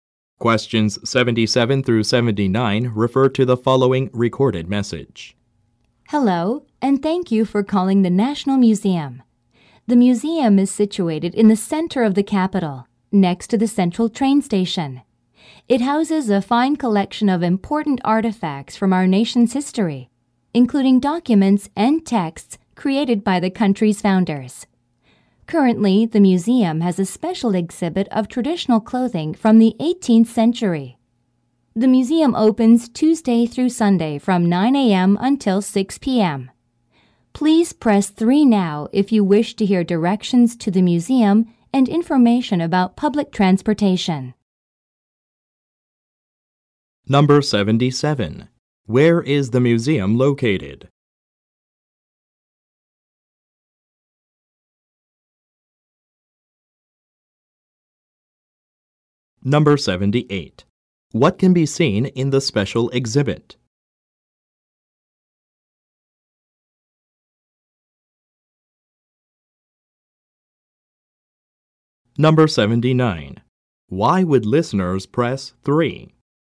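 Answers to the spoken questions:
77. In the center of the capital, next to the central train station
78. Traditional clothing from the 18th century
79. To hear directions to the museum and information about public transportation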